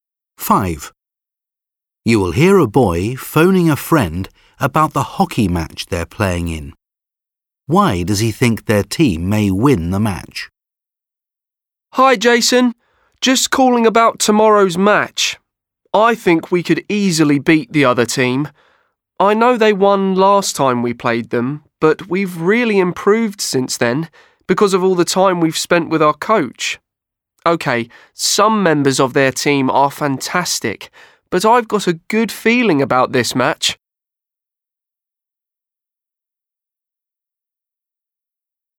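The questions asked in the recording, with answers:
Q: Why does he think their team may win the match?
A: They have improved a lot thanks to the time spent with their coach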